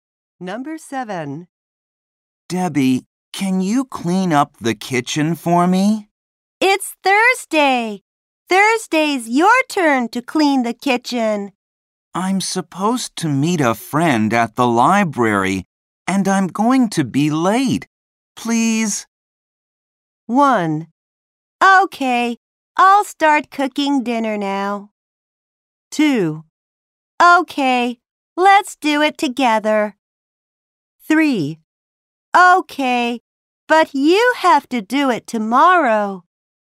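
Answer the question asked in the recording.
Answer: 3: Okay, but you have to do it tomorrow.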